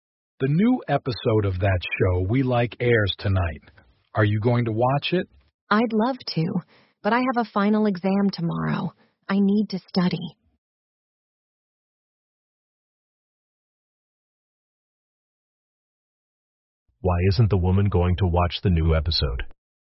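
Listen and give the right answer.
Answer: She has to study for a final exam tomorrow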